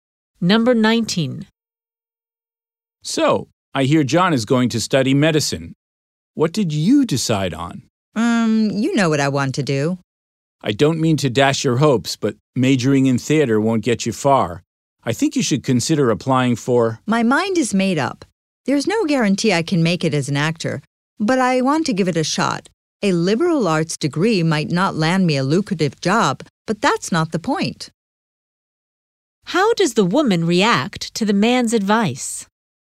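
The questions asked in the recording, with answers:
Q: How does the woman react to the man's advice?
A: She rejects it and will study theater anyway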